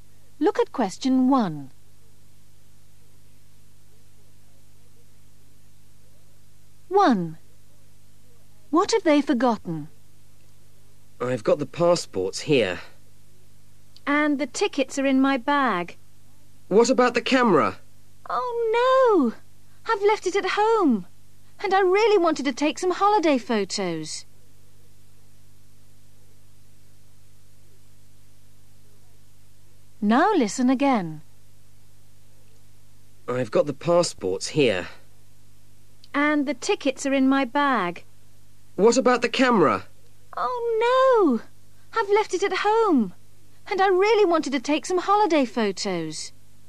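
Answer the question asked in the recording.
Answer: the camera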